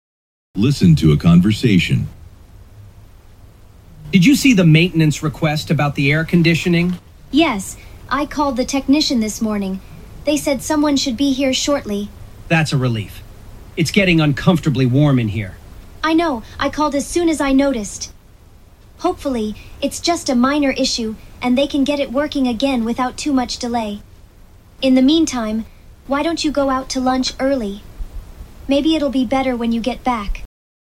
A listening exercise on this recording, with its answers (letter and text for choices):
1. Why did the woman call a technician?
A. An air-conditioner is leaking.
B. A room is too hot.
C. An elevator needs maintenance.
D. A window will not open.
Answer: B. A room is too hot.

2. What does the woman suggest the man do?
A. Finish an assignment early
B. Wait for a service agent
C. Open a door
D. Take a break early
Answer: D. Take a break early

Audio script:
Listen to a conversation.
Man: Did you see the maintenance request about the air-conditioning?
Woman: Yes, I called the technician this morning. They said someone should be here shortly.
Man: That's a relief. It's getting uncomfortably warm in here.
Woman: I know—I called as soon as I noticed. Hopefully, it's just a minor issue and they can get it working again without too much delay. In the meantime, why don't you go out to lunch early? Maybe it'll be better when you get back.